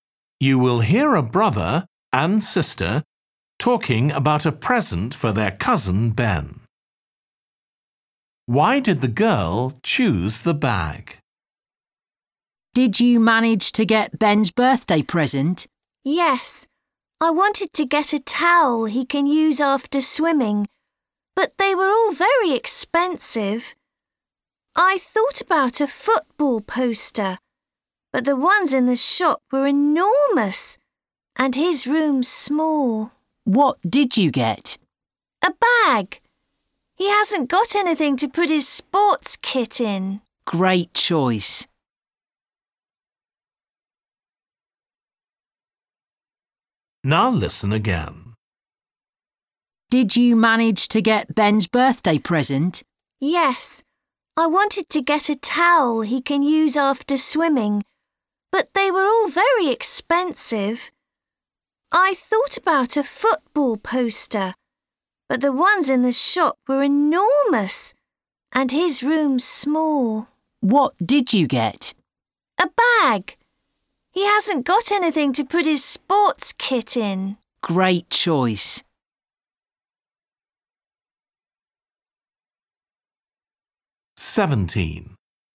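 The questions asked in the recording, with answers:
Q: Why did the girl choose the bag?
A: Ben has nothing to put his sports kit in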